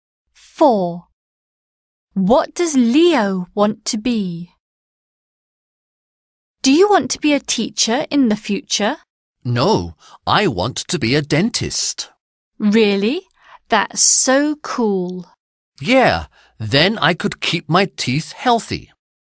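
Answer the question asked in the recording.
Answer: A dentist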